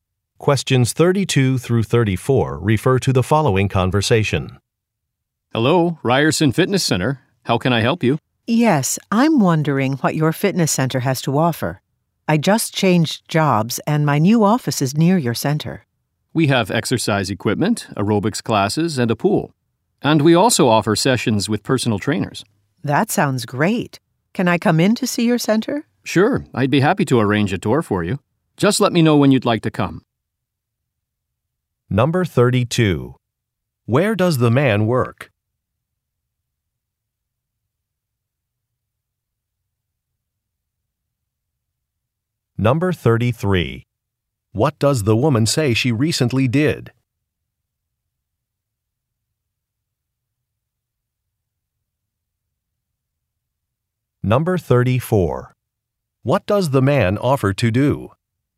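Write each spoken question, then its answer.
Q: Where does the man work?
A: At a fitness center

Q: What does the woman say she recently did?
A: She changed jobs

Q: What does the man offer to do?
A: Arrange a tour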